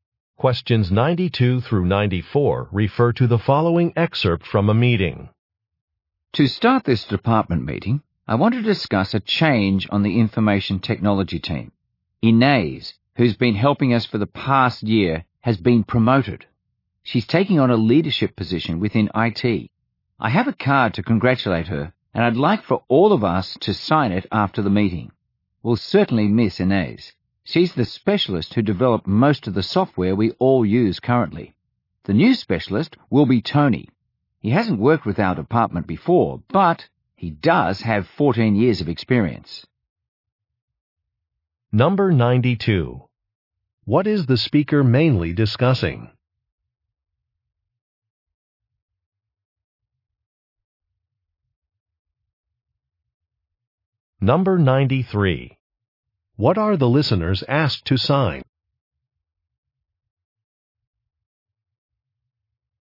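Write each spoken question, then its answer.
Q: What is the speaker mainly discussing?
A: A staff change on the IT team

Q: What are the listeners asked to sign?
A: A card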